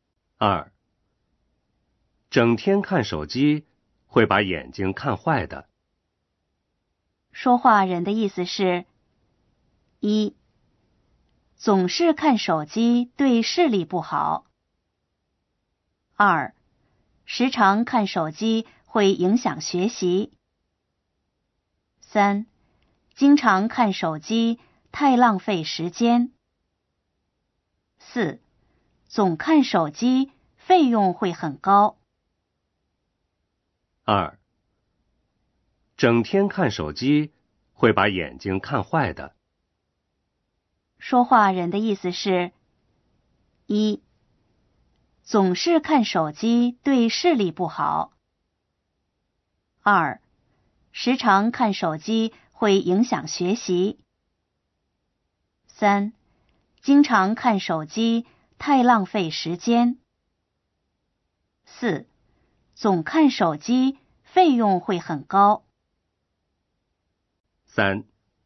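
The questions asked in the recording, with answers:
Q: 说话人的意思是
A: 一: 总是看手机对视力不好。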